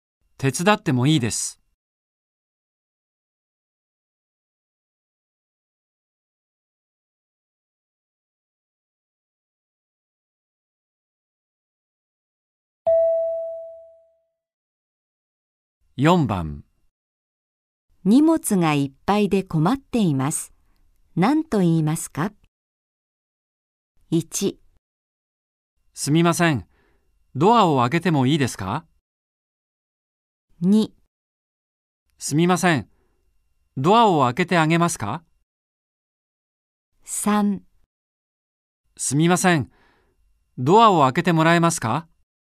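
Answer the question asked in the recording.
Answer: 3: すみません。ドアを開けてもらえますか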